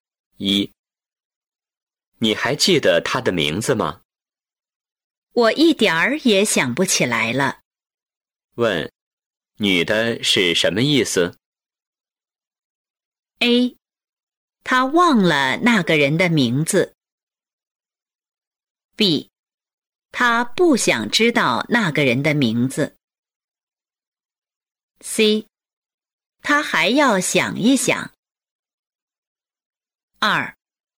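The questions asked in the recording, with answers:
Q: 问,女的是什么意思?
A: A: 她忘了那个人的名字。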